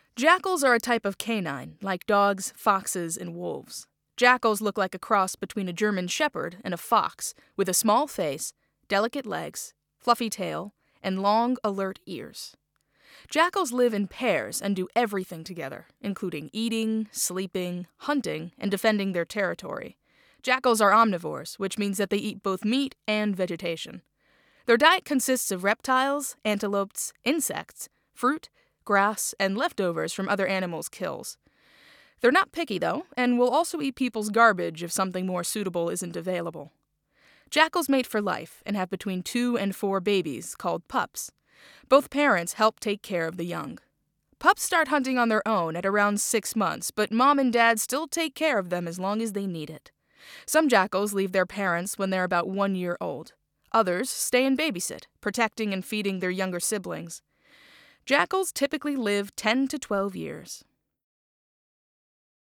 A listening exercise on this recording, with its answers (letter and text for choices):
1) The main purpose of the lecture is to -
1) describe where most jackals are found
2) show that jackals and people can live together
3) explain why jackals may be in danger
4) provide basic information about jackals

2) What does "jackals are omnivores" mean?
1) They eat both meat and vegetation.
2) They look like dogs, foxes and wolves.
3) They defend their territory.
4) They live in pairs.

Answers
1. 4) provide basic information about jackals
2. 1) They eat both meat and vegetation.